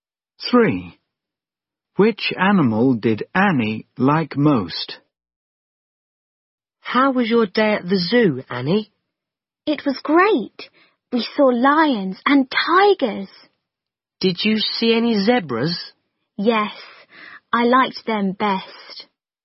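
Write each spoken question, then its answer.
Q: Which animal did Annie like most?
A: Zebras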